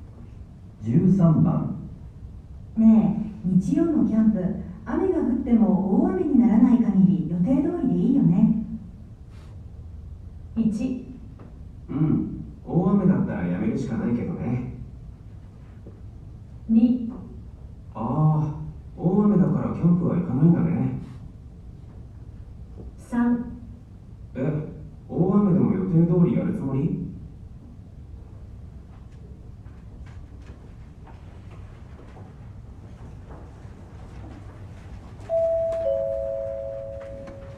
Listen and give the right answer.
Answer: 1

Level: N1 Listening · Test 2